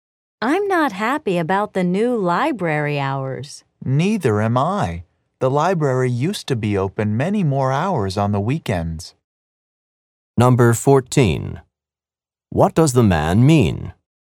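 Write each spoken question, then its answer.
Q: What does the man mean?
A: He is also unhappy that the library is open fewer hours on weekends.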